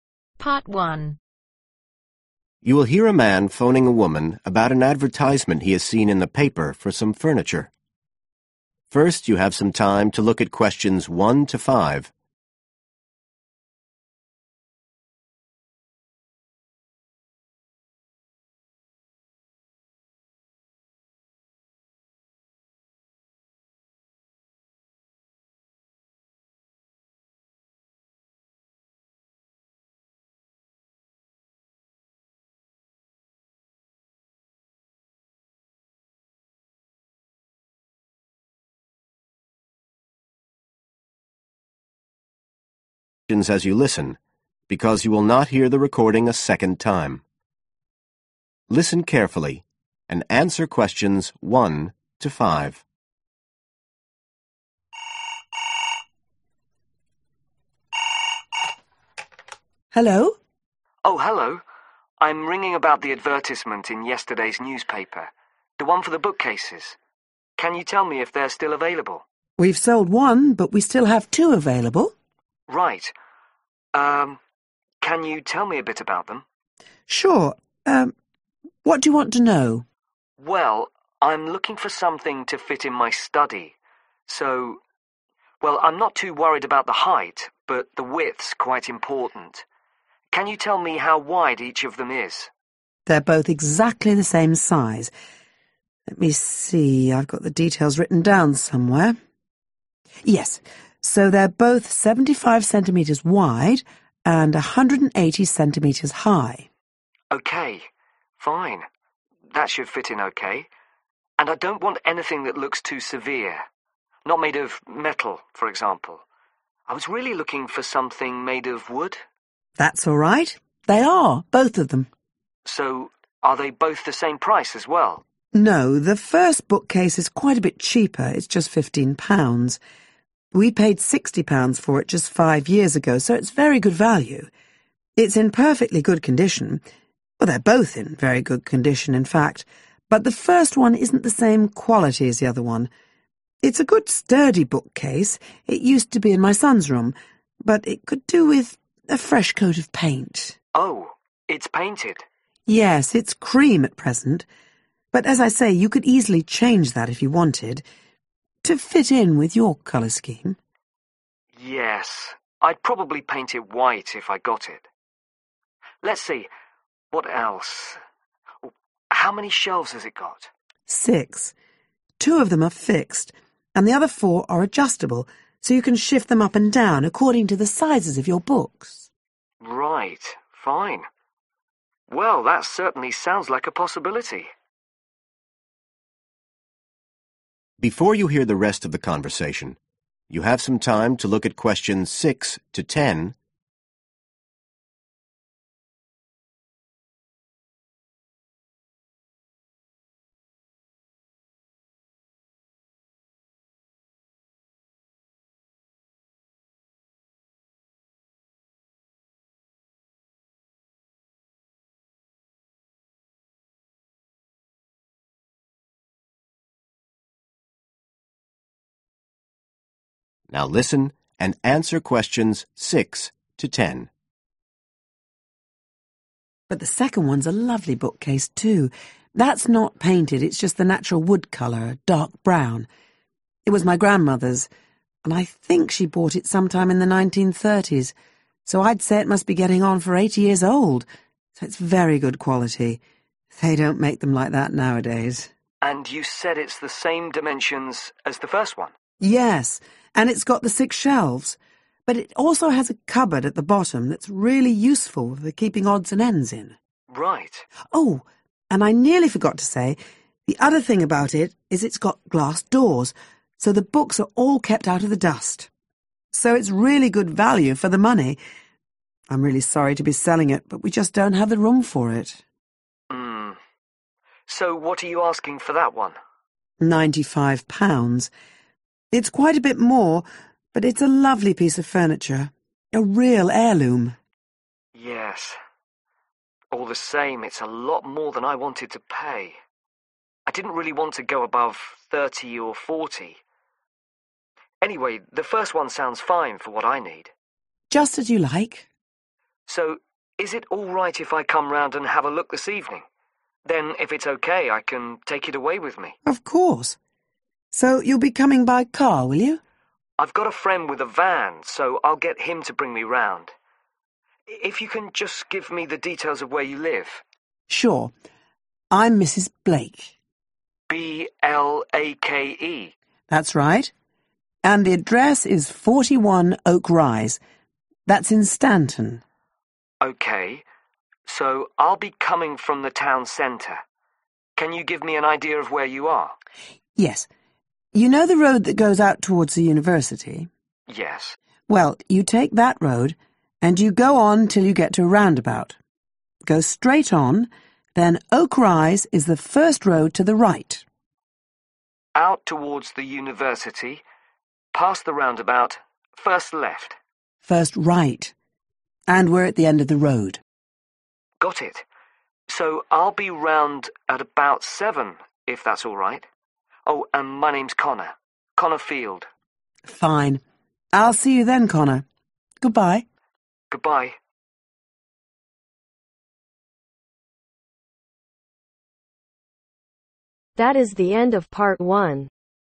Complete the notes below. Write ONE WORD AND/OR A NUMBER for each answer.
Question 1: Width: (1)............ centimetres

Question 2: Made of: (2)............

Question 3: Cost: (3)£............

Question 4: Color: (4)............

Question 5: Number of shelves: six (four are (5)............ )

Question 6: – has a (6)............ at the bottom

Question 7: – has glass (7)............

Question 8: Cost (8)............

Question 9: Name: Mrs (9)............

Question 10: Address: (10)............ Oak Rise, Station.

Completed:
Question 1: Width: 75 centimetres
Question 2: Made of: Wood
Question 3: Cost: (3)£15
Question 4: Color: Cream
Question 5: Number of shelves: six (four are Adjustable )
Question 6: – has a Cupboard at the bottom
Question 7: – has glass Doors
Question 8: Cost £95
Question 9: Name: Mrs Blake
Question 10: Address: 41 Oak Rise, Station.